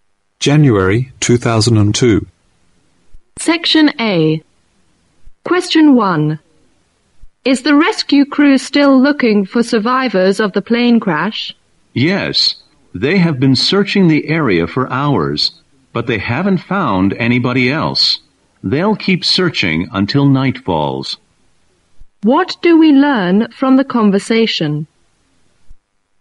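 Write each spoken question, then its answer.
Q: What do we learn from the conversation?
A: The crew is still searching but hasn't found any more survivors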